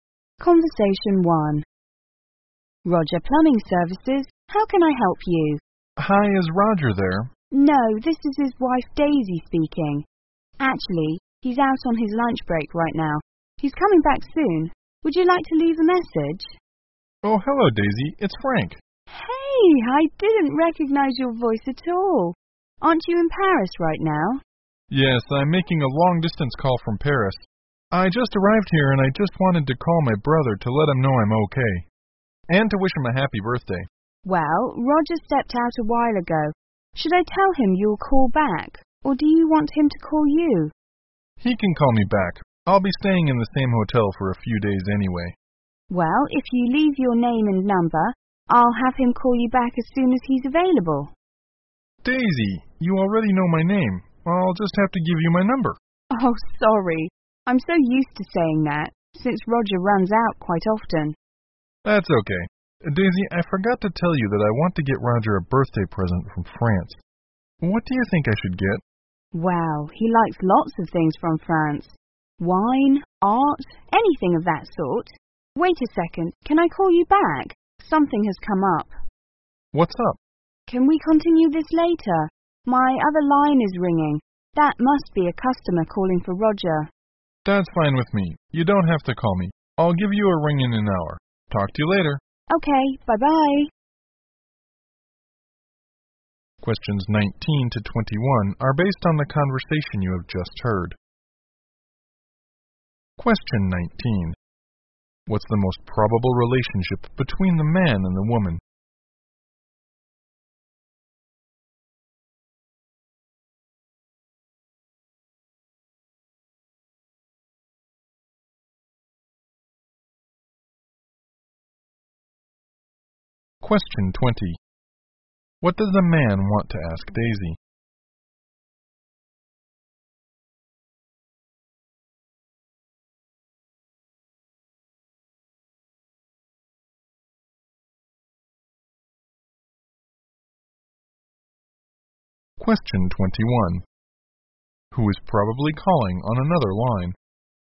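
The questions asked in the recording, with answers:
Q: What's the most probable relationship between the man and the woman?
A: Sister-in-law and brother-in-law

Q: What does the man want to ask Daisy?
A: What birthday present to get Roger from France

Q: Who is probably calling on another line?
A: A customer calling for Roger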